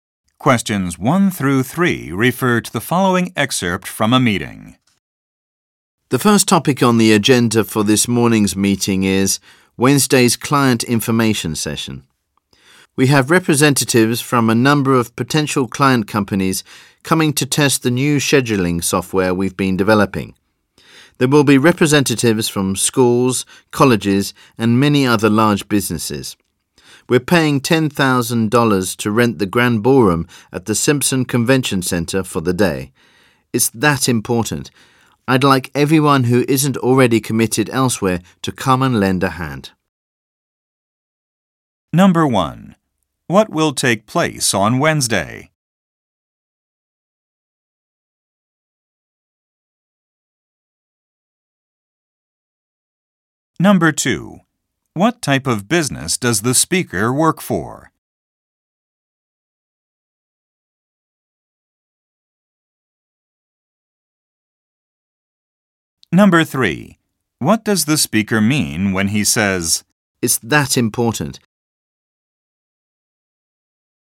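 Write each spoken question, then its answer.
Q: What will take place on Wednesday?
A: A client information session

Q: What type of business does the speaker work for?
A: A software developer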